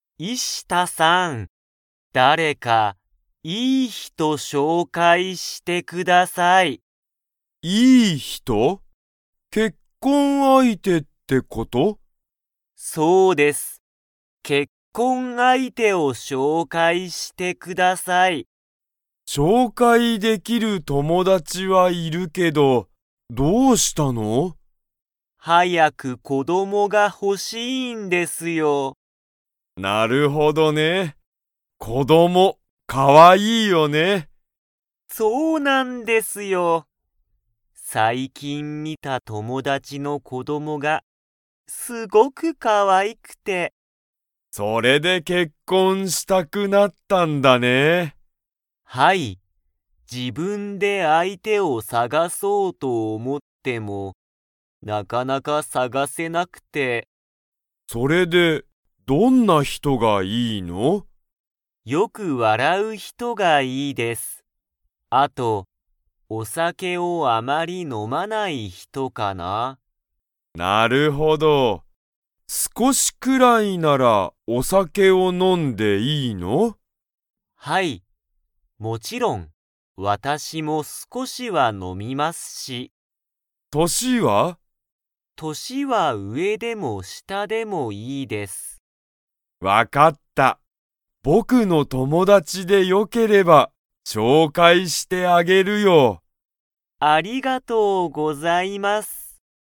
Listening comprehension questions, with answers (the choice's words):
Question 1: 佐藤さとうさんは、なぜ結婚けっこんしたいと思おもっていますか?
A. お酒さけが飲のみたいから。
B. 年としが上うえの人ひとが好すきだから。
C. 子こどもがほしいから。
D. いい人ひとを紹介しょうかいしたいから。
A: 子こどもがほしいから。

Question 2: 佐藤さとうさんは、お酒さけを 。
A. 少すこし飲のむ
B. 全然ぜんぜん飲のまない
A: 少すこし飲のむ